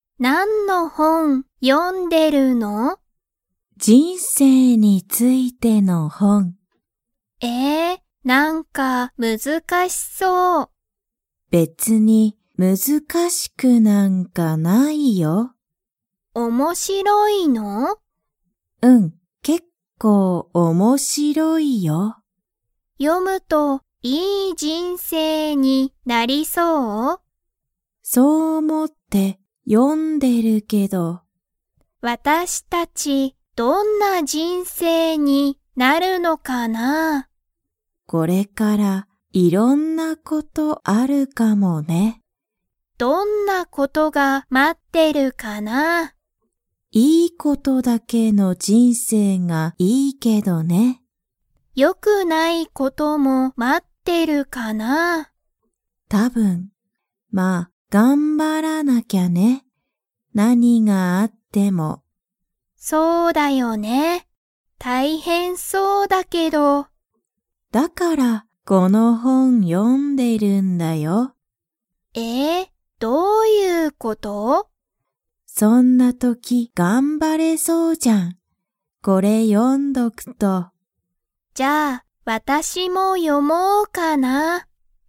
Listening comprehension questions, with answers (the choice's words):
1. ジュンは、____についての本(ほん)を読(よ)んでいる。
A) 犬いぬ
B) 人生(じんせい)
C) 水(みず)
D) 津波(つなみ)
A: 人生(じんせい)

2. ジュンは、何(なに)があっても頑張(がんば)りますか?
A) はい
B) いいえ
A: はい

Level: Level 2